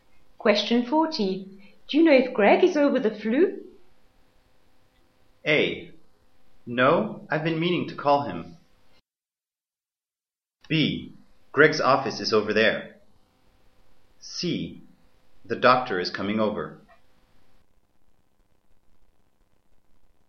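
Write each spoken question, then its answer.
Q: Do you know if Greg is over the flu?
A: A: No, I've been meaning to call him.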